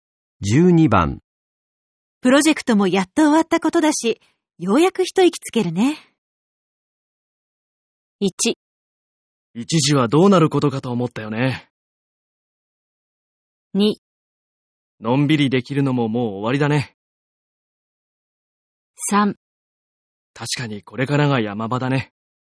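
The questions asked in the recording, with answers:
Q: プロジェクトもやっと終わったことだし、ようやく一息つけるね。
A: 1: 一時はどうなることかと思ったよね。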